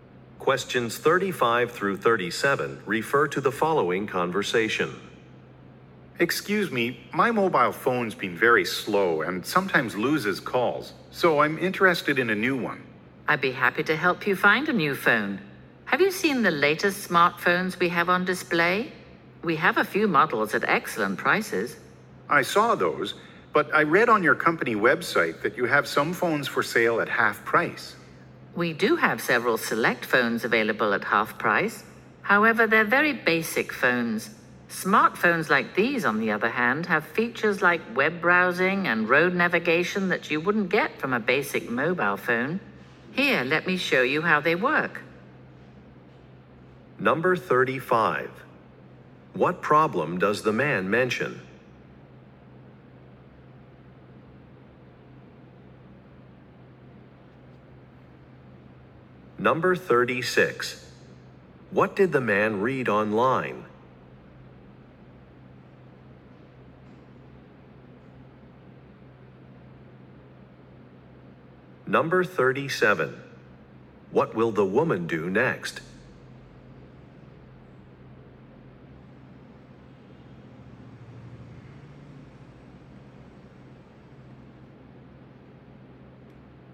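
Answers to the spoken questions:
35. His mobile phone is very slow and sometimes loses calls.
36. Some phones are for sale at half price.
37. Show him how the smartphones work.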